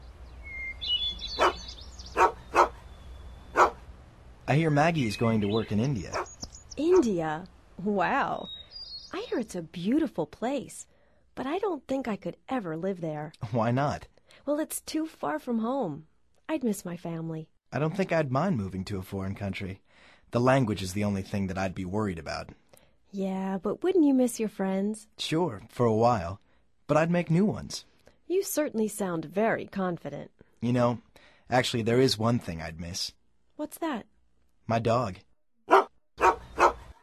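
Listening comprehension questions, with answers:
Activity 45: Basándote en la conversación anterior, selecciona las opciones más adecuadas para cada oración. Verifica luego las respuestas correctas ...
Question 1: What is Maggie going to do in India?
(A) To study.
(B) To work.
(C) To travel.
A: To work.

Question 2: Why doesn't Diana think she could live there?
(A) It's too far from home.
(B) She'd miss her friends.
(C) She'd miss her family dog.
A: It's too far from home.

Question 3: Nelson would be worried about ...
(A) his dog.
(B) his family.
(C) the language.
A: the language.

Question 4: What is one thing Nelson would miss?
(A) His work.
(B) His friends.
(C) His dog.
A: His dog.

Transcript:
I hear Maggie is going to work in India.
India! Wow! I hear it's a beautiful place, but I don't think I could ever live there.
Why not?
Well, it's too far from home. I'd miss my family.
I don't think I'd mind moving to a foreign country. 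The language is the only thing that I'd be worried about.
Yeah, but wouldn't you miss your friends?
Sure, for a while, but I'd make new ones.
You certainly sound very confident.
You know, actually, there is one thing I'd miss.

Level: Nivel Avanzado

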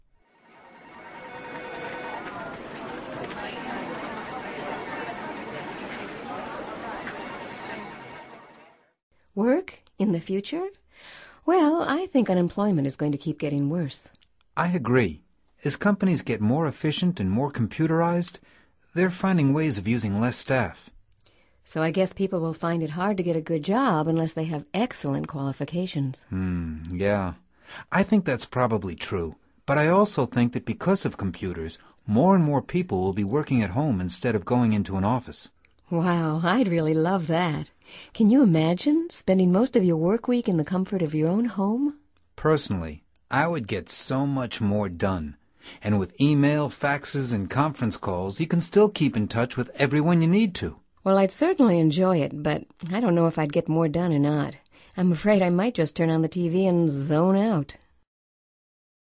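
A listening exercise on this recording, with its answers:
Activity 120: Basándote en los comentarios anteriores, selecciona las opciones más adecuadas. Verifica luego las respuestas correctas.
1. Dialogue # 1 suggests that ...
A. unemployment is going to keep getting worse.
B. employment quality is going to improve.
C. unemployment will get more computerized.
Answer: unemployment is going to keep getting worse.

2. Dialogue # 1 also suggests that ...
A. people at companies will get more efficient.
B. more people will keep going into offices.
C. more people will be working at home.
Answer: more people will be working at home.

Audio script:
Work? In the future? Well, I think unemployment is going to keep getting worse.
I agree. As companies get more efficient and more computerized, they're finding ways of using less staff.
So I guess people will find it hard to get a good job unless they have excellent qualifications.
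I think that's probably true. But I also think that because of computers, more and more people will be working at home instead of going into an office.
Wow, I'd really love that. Can you imagine – spending most of your work week in the comfort of your own home?
Personally, I would get so much more done. And with e-mail, faxes, and conference calls you can still keep in touch with everyone you need to.
Well, I'd certainly enjoy it, but I don't know if I'd get more done or not. I'm afraid I might just turn on the TV and zone out!

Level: Nivel Avanzado

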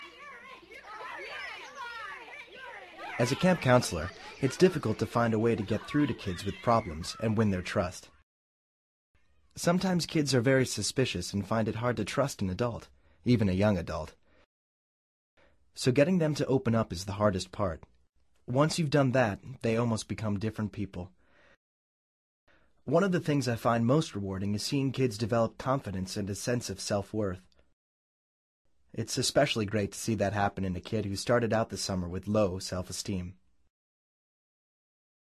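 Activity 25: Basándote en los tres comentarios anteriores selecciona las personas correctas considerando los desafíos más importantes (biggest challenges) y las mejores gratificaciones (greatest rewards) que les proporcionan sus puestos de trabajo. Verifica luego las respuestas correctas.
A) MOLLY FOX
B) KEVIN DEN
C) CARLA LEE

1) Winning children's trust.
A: KEVIN DEN

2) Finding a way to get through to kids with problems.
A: KEVIN DEN

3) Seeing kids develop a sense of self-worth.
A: KEVIN DEN

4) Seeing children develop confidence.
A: KEVIN DEN

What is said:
As a camp counselor, it's difficult to find a way to get through to kids with problems and win their trust. Sometimes kids are very suspicious and find it hard to trust an adult - even a young adult. So getting them to open up is the hardest part. Once you've done that, they almost become different people. One of the things I find most rewarding is seeing kids develop confidence and a sense of self-worth. 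It's especially great to see that happen in a kid who started out the summer with low self-esteem.

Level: Nivel Avanzado

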